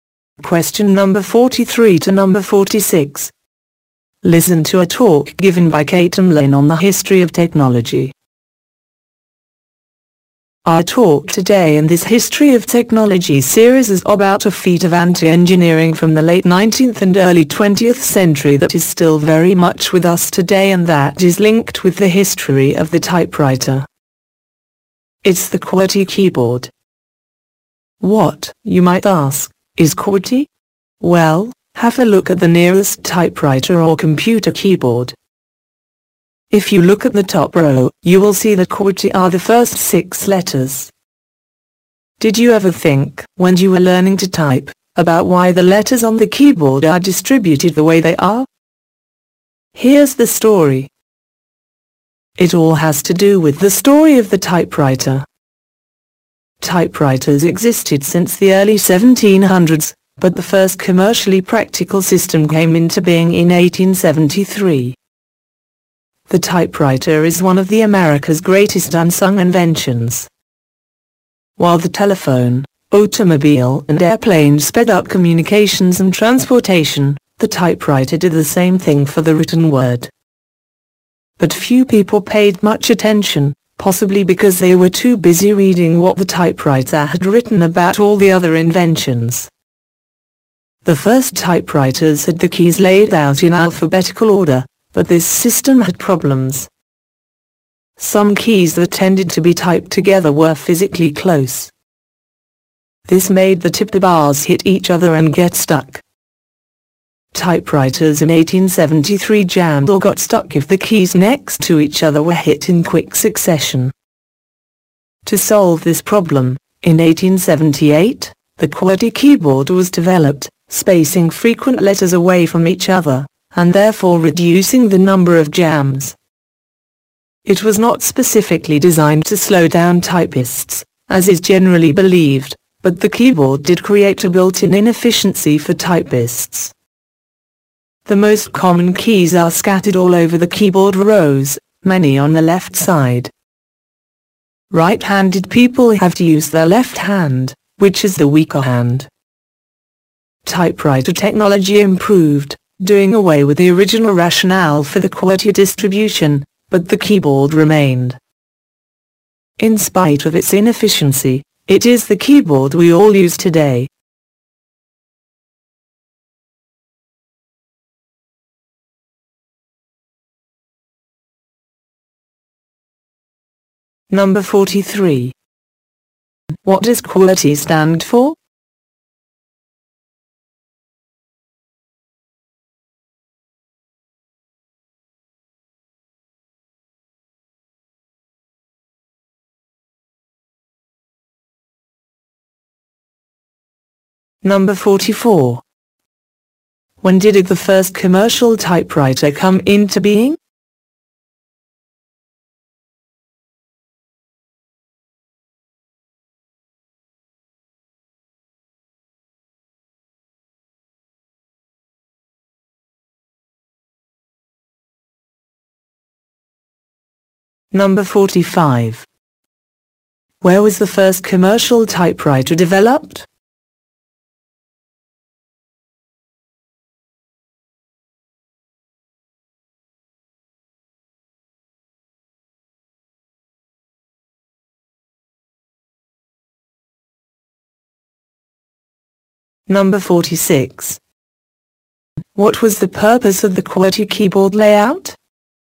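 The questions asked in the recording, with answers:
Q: What does QWERTY stand for?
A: The first six letters of the top row of the keyboard.

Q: When did the first commercial typewriter come into being?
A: In 1873.

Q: What was the purpose of the QWERTY keyboard layout?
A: To space frequent letters apart and reduce jams.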